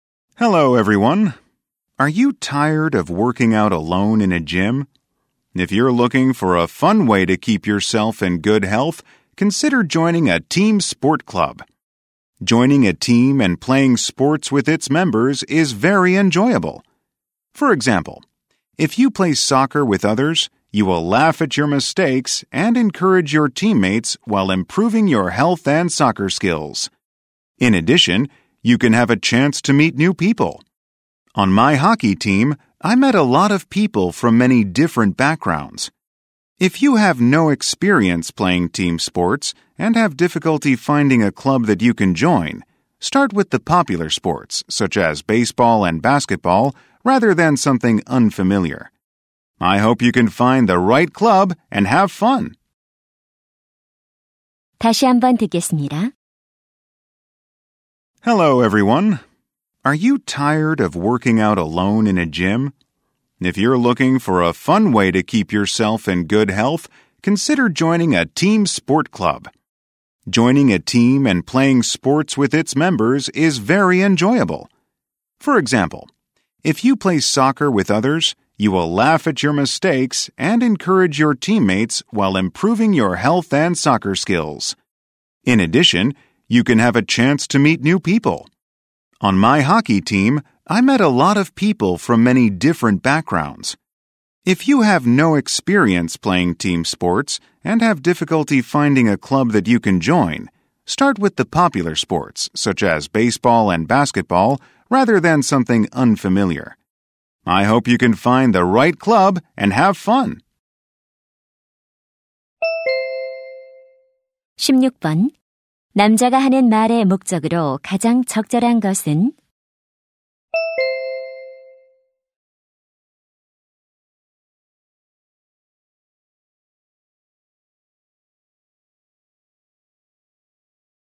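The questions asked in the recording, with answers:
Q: 남자가 하는 말의 목적으로 가장 적절한 것은?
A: 팀 스포츠 클럽 가입을 권장하려고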